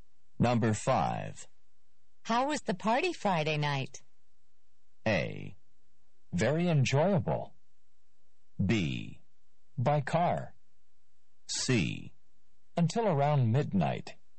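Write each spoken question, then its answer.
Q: How was the party Friday night?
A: A: Very enjoyable.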